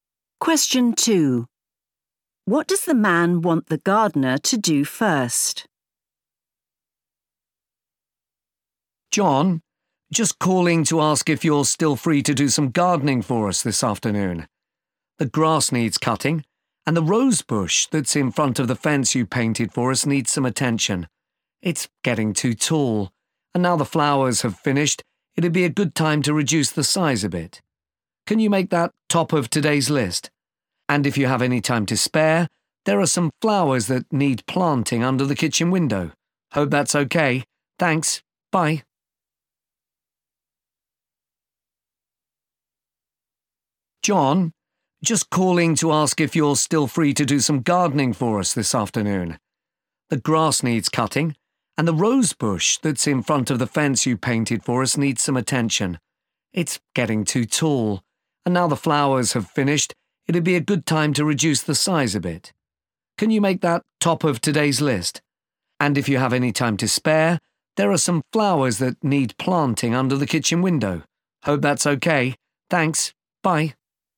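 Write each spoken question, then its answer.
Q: What does the man want the gardener to do first?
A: Cut back the rose bush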